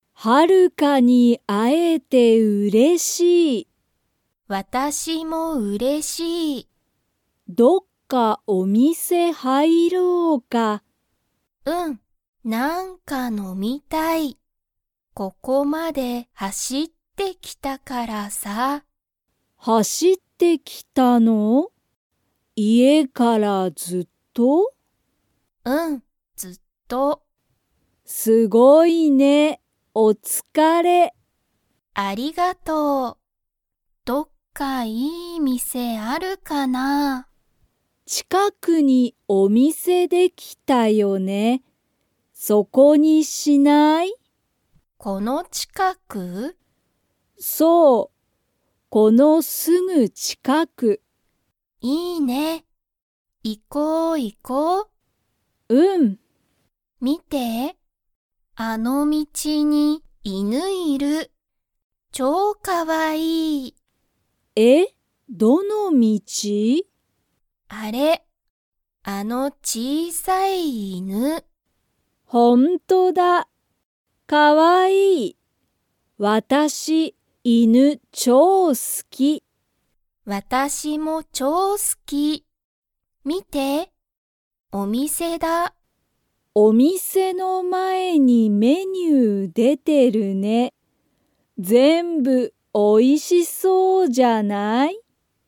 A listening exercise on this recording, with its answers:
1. ハルカは、ここまで____。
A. 会(あ)っていた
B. 歩(ある)いてきた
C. 走(はし)ってきた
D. 入(はい)っていた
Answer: 走(はし)ってきた

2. カレンとハルカは、犬(いぬ)が好(す)きですか?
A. はい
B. いいえ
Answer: はい

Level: Level 2

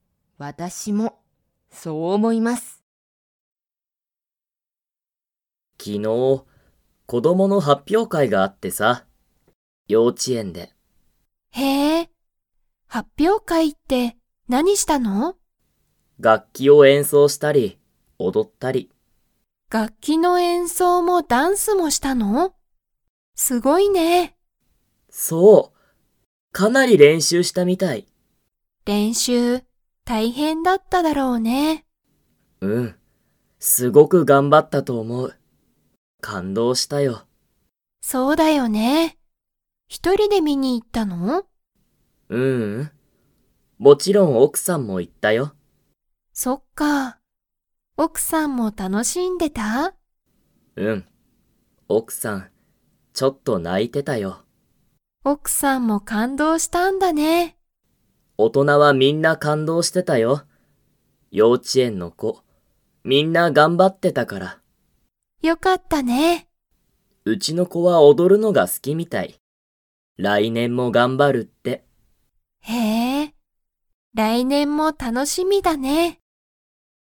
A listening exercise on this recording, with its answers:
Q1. どこで、子供こどもの発表会はっぴょうかいがありましたか?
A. 楽器がっき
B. 幼稚ようち園えん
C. 会社かいしゃ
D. 公園こうえん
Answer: 幼稚ようち園えん

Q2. ケイタの奥おくさんは、発表会はっぴょうかいを見みて 。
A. ちょっと泣ないた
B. 全然ぜんぜん泣なかなかった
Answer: ちょっと泣ないた

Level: Level 4

